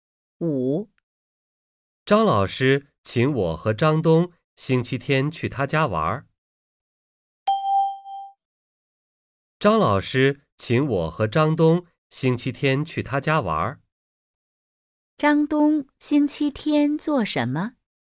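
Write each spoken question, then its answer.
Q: 张东星期天做什么?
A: 去张老师家玩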